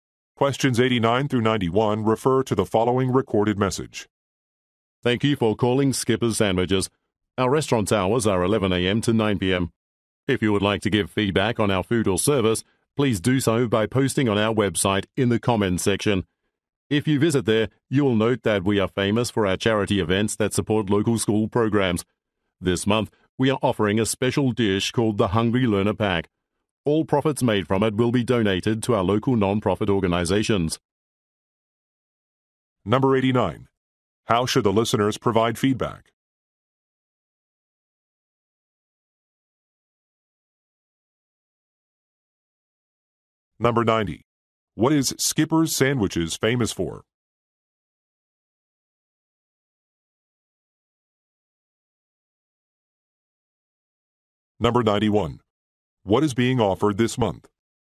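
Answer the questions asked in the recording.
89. By posting on the website
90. Charity events supporting local schools
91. A special dish, the Hungry Learner Pack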